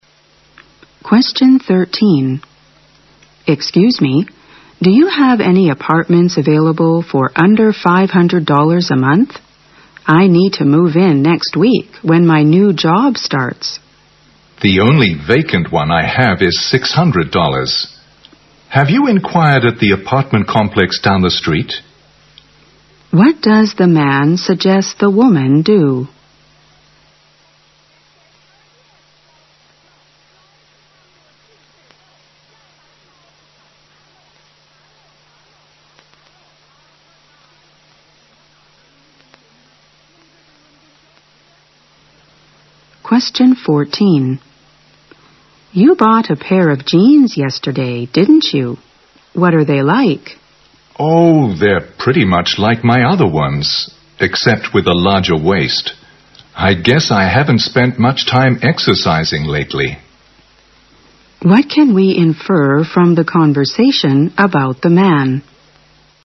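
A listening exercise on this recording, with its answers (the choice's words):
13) What does the man suggest the woman do?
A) Look for a place near her office.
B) Find a new job down the street.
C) Make inquiries elsewhere.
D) Rent the $600 apartment.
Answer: Make inquiries elsewhere.

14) What can we infer from the conversation about the man?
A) He prefers to wear jeans with a larger waist.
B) He has been extremely busy recently.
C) He has gained some weight lately.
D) He enjoyed going shopping with Jane yesterday.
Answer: He has gained some weight lately.

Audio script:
W: Excuse me, do you have any apartments available for under 500 dollars a month? I need to move in next week when my new job starts.
M: The only vacant one I have is 600 dollars, have you inquired at the apartment complex down the street?
Q: What does the man suggest the woman do?
W: You bought a pair of jeans yesterday, didn't you? 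What are they like?
M: Oh, they are pretty much like my other ones, except with a larger waist. I guess I haven't spent much time exercising lately.
Q: What can we infer from the conversation about the man?

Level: 大学英语四级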